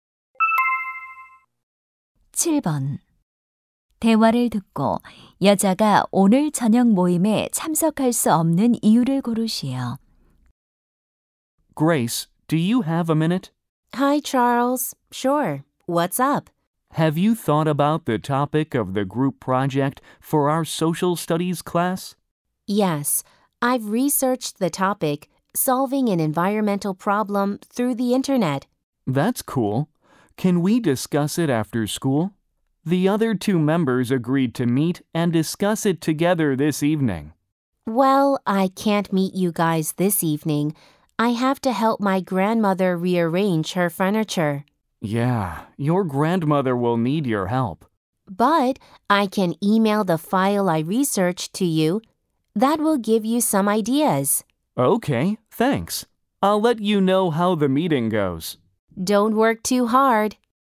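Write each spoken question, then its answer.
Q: 대화를 듣고 여자가 오늘 저녁 모임에 참석할 수 없는 이유를 고르시오.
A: 할머니의 가구 재배치를 도와드려야 해서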